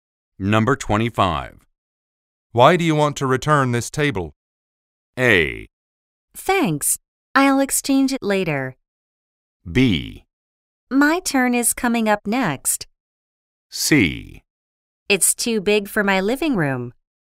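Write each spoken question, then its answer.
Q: Why do you want to return this table?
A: C: It's too big for my living room.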